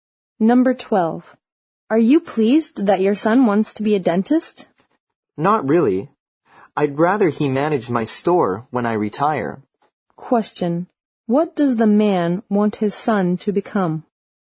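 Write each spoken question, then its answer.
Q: What does the man want his son to become?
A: The manager of his store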